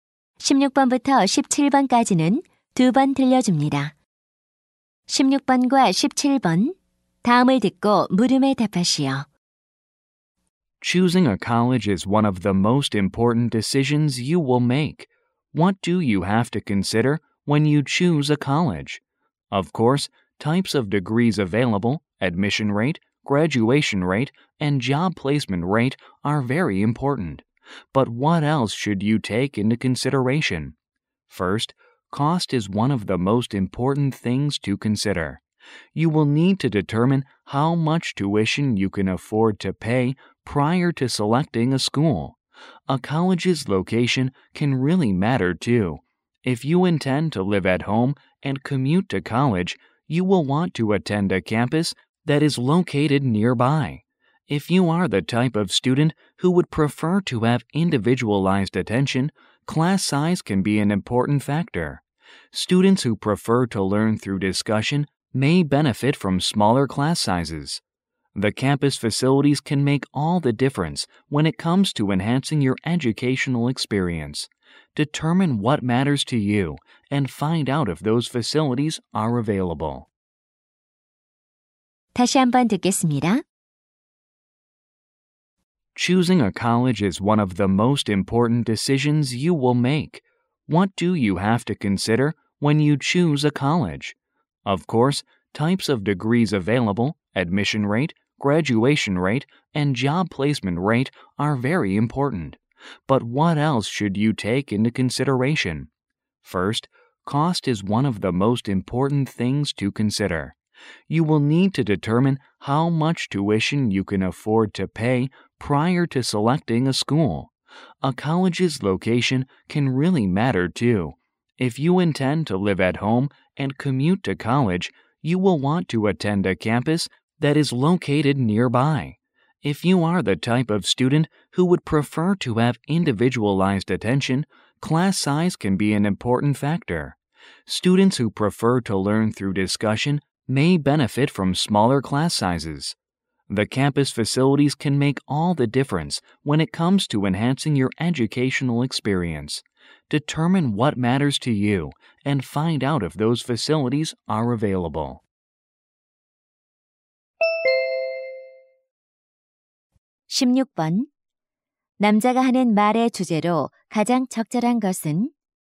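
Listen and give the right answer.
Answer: 대학을 선택할 때 고려해야 할 요소들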